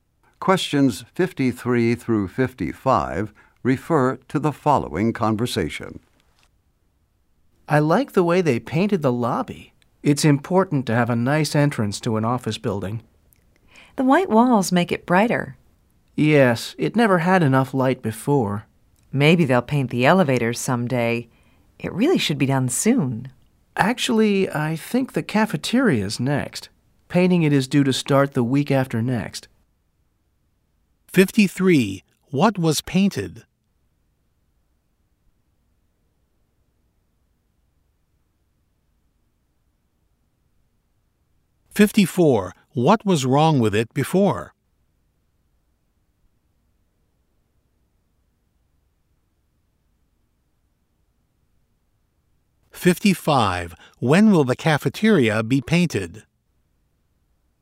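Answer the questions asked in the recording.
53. The lobby
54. It never had enough light
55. The week after next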